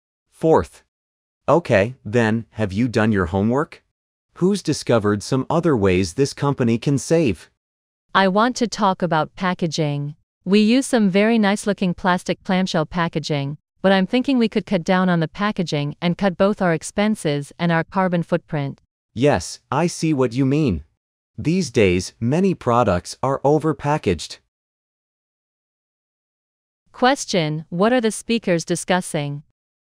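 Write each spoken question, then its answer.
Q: What are the speakers discussing?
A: Ways for the company to save money by cutting packaging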